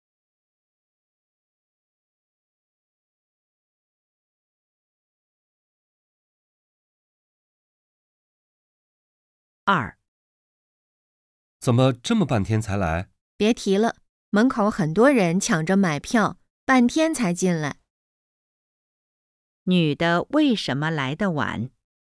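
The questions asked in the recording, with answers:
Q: 女的为什么来得晚?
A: 门口很多人抢着买票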